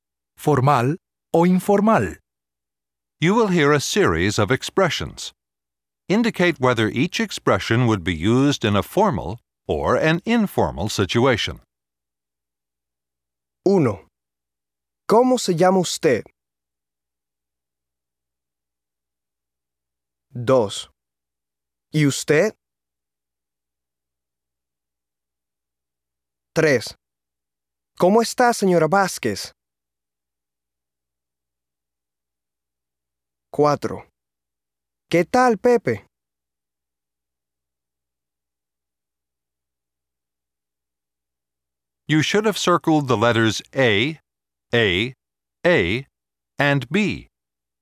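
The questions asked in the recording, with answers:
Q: ¿Cómo se llama usted?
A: formal

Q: ¿Y usted?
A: formal

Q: ¿Cómo está, señora Vázquez?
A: formal

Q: ¿Qué tal, Pepe?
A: informal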